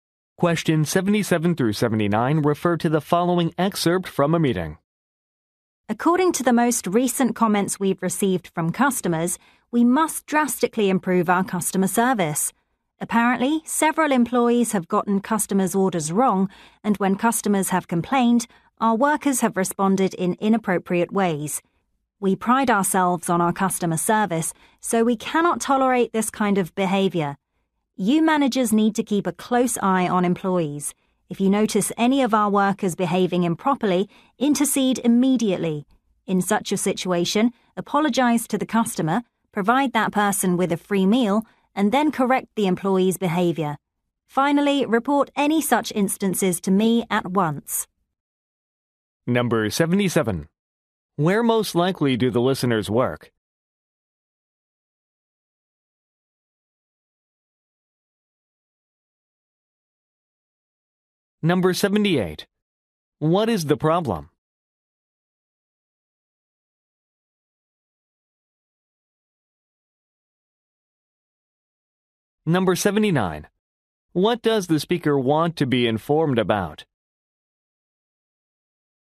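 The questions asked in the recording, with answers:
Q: Where most likely do the listeners work?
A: At a restaurant

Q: What is the problem?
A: Employees got orders wrong and responded rudely to complaints

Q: What does the speaker want to be informed about?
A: Any instances of employees behaving improperly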